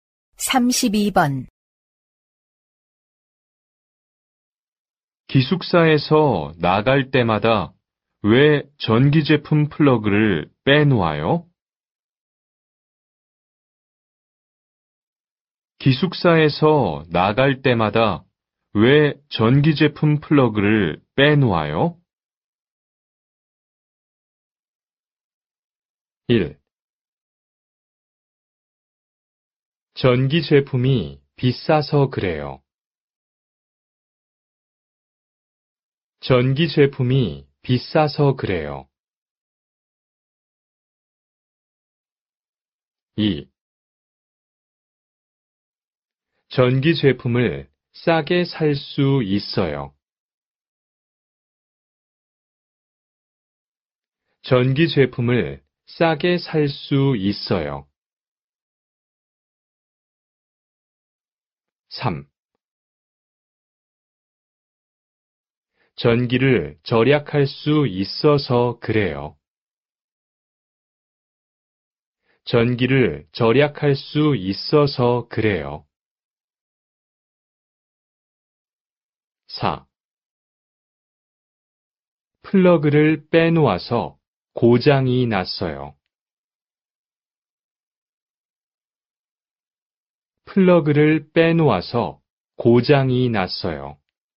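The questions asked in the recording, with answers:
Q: 기숙사에서 나갈 때마다 왜 전기 제품 플러그를 빼놓아요?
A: 3: 전기를 절약할 수 있어서 그래요.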